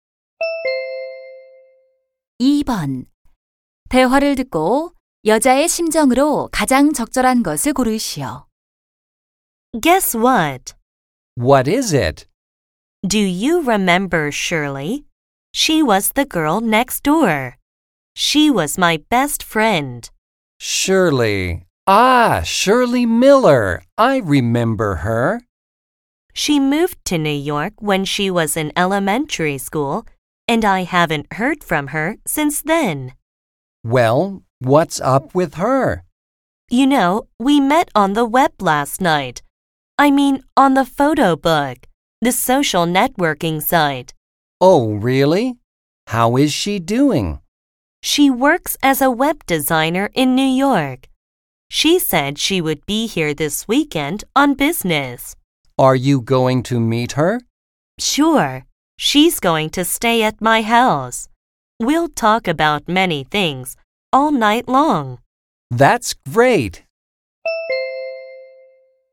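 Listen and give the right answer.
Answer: 설렘, 기쁨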